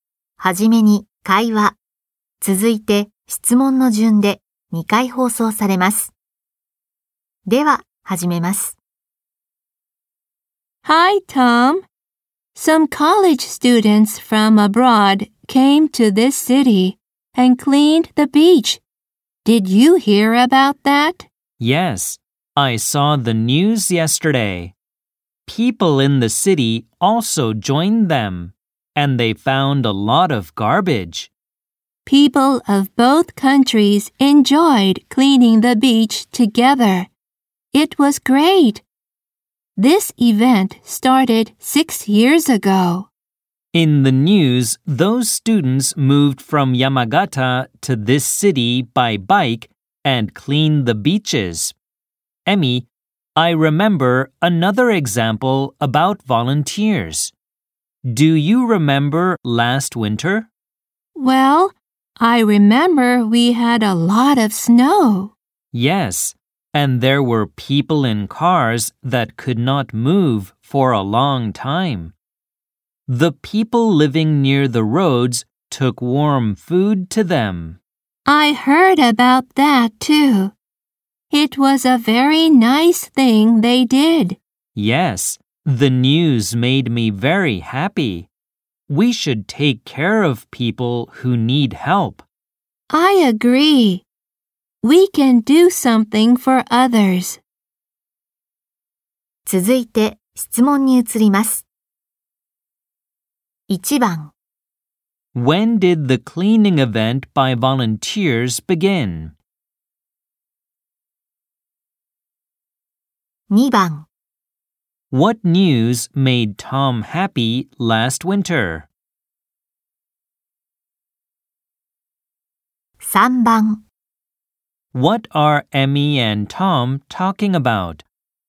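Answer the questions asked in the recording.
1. 6 years ago
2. People living near the roads took warm food to people in cars that could not move
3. Volunteers helping others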